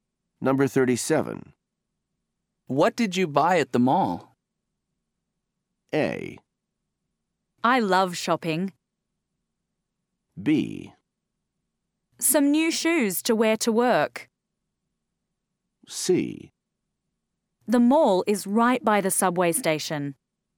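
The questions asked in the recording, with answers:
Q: What did you buy at the mall?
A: B: Some new shoes to wear to work.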